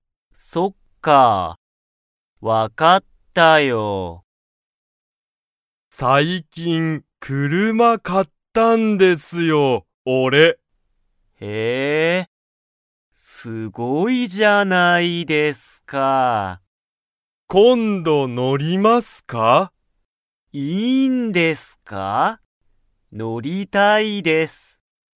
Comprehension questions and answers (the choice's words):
加藤(かとう)さんは、最近(さいきん)、____を買(か)った。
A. ご飯(はん)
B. 写真(しゃしん)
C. 英語(えいご)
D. 車(くるま)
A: 車(くるま)

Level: Level 1